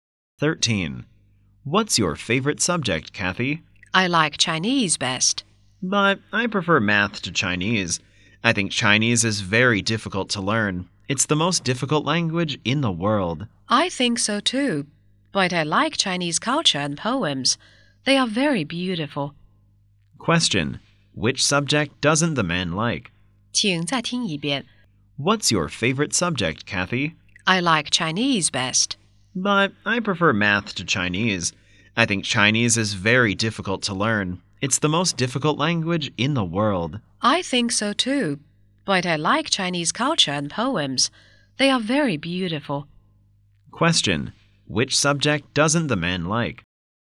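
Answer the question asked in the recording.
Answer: Chinese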